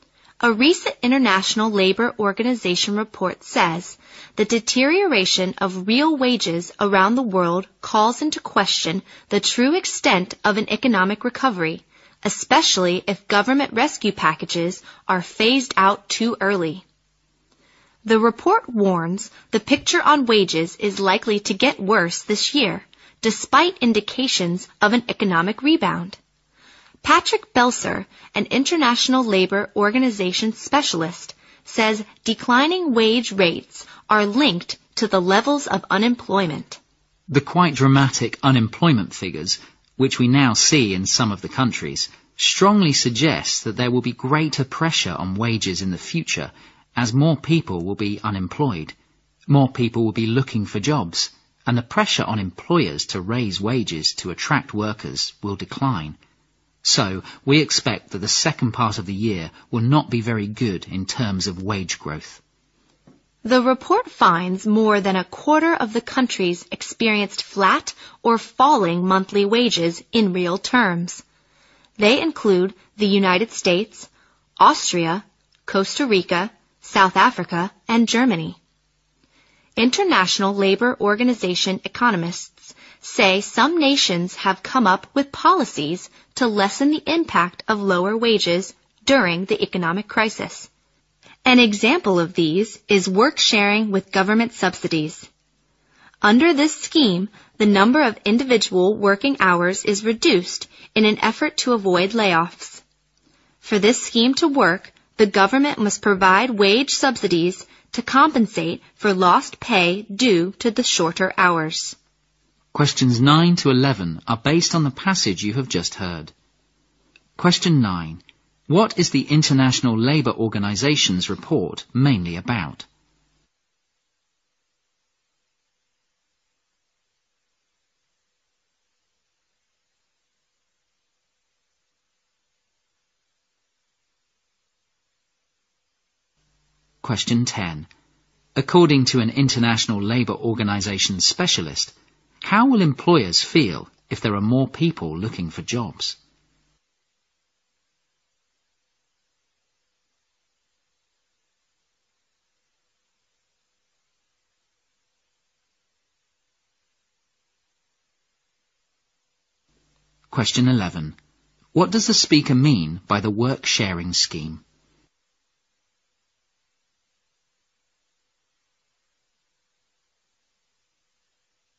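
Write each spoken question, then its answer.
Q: What is the International Labour Organization's report mainly about?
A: The decline of real wages around the world

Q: According to an International Labour Organization specialist, how will employers feel if there are more people looking for jobs?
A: Less pressure to raise wages

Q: What does the speaker mean by the work sharing scheme?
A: Reducing individual working hours to avoid layoffs, with government wage subsidies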